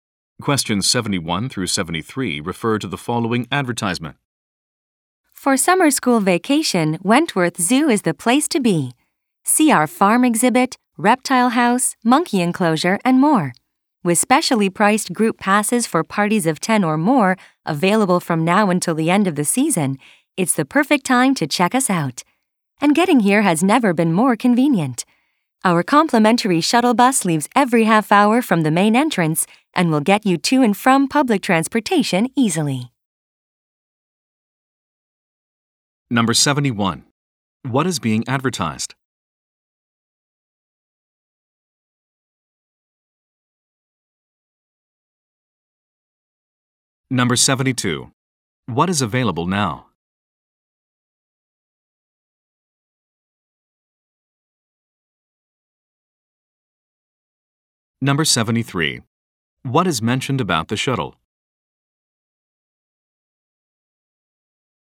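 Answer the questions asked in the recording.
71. A zoo
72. Specially priced group passes
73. It is free and leaves every half hour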